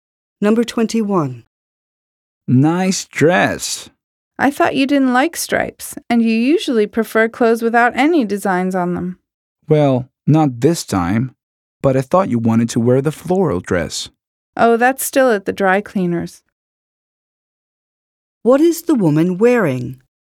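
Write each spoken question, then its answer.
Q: What is the woman wearing?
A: A striped dress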